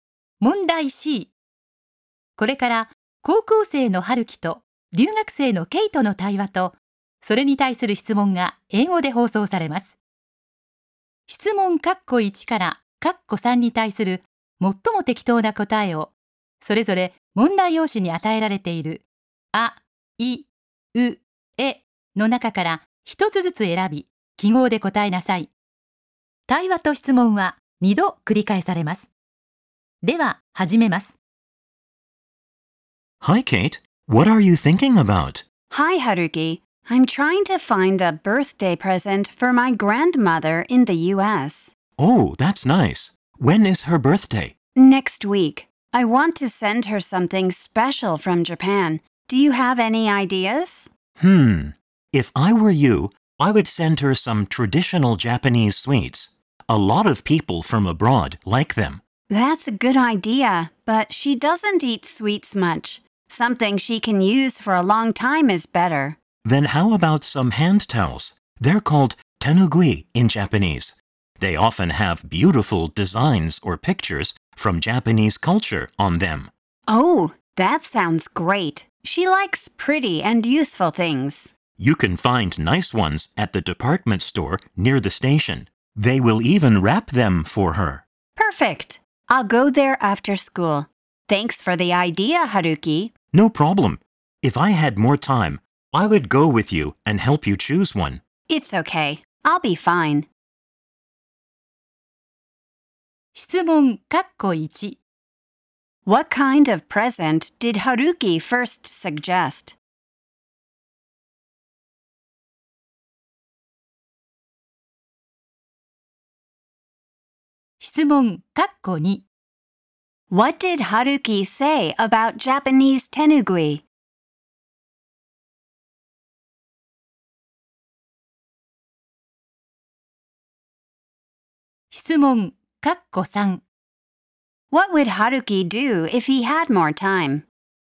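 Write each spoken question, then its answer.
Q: What kind of present did Haruki first suggest?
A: Traditional Japanese sweets.

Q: What did Haruki say about Japanese tenugui?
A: They often have beautiful designs or pictures from Japanese culture on them.

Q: What would Haruki do if he had more time?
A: He would go with Kate and help her choose one.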